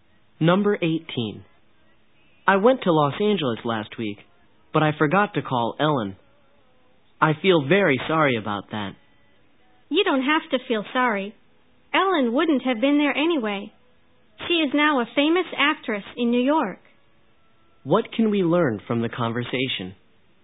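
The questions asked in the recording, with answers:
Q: What can we learn from the conversation?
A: Ellen is now in New York, not Los Angeles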